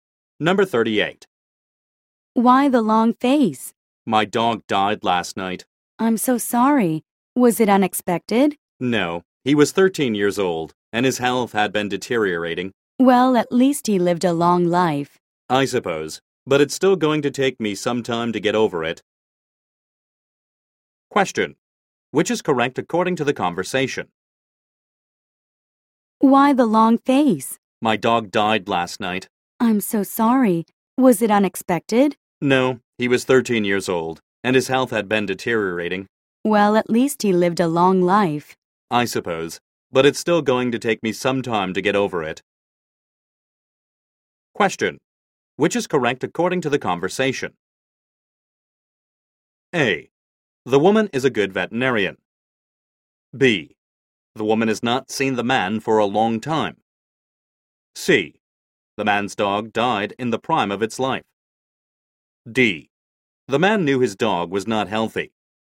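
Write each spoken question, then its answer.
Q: Which is correct according to the conversation?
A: D: The man knew his dog was not healthy.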